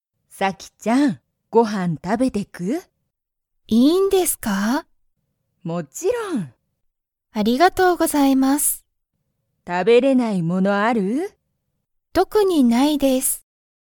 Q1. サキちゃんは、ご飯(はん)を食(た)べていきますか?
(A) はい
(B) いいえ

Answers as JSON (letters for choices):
{"1": "A"}

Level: Level 1